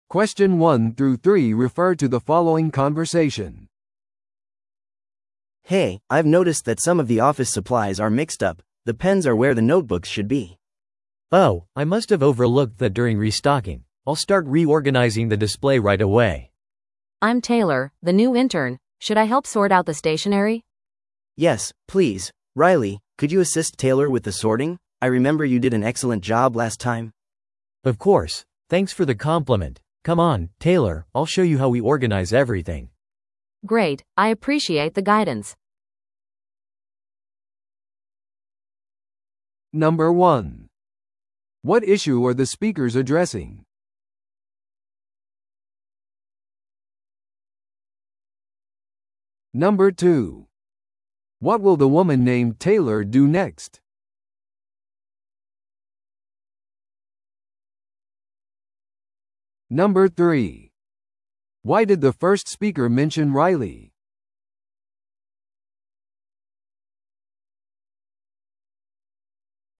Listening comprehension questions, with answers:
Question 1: What issue are the speakers addressing?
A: 文房具がディスプレイで誤分類されている

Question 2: What will the woman named Taylor do next?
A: ライリーと共に文房具を整理する

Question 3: Why did the first speaker mention Riley?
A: ライリーは以前に良い仕事をしたと賞賛されていた

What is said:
A: Hey, I've noticed that some of the office supplies are mixed up. The pens are where the notebooks should be.
B: Oh, I must have overlooked that during restocking. I'll start reorganizing the display right away.
C: I'm Taylor, the new intern. Should I help sort out the stationery?
A: Yes, please. Riley, could you assist Taylor with the sorting? I remember you did an excellent job last time.
B: Of course. Thanks for the compliment. Come on, Taylor, I'll show you how we organize everything.
C: Great, I appreciate the guidance.